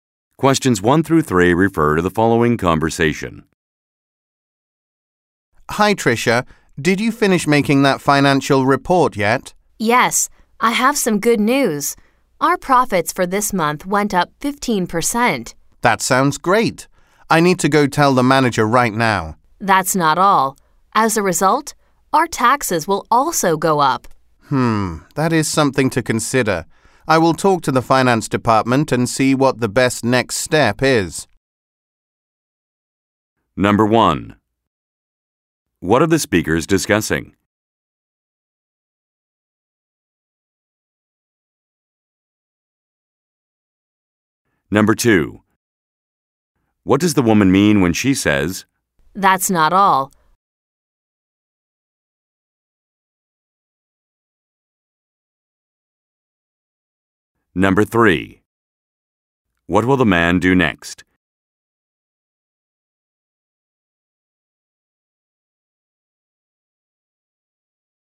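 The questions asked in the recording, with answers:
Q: What are the speakers discussing?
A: A financial report showing profits went up 15%

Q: What does the woman mean when she says, "That's not all"?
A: She has more news: their taxes will also go up

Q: What will the man do next?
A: Talk to the finance department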